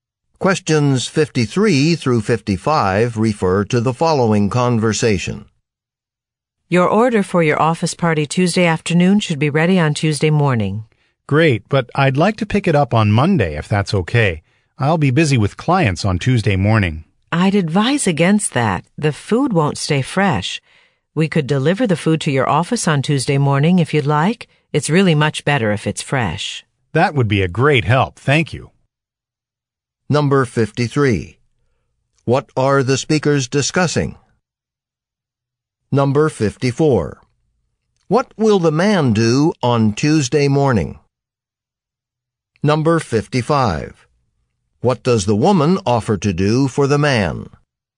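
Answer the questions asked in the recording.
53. A food order for an office party
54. Meet with clients
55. Deliver the food to his office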